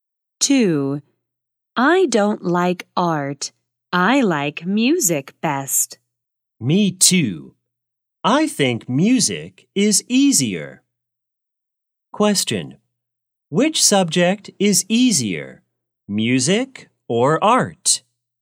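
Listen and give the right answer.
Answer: Music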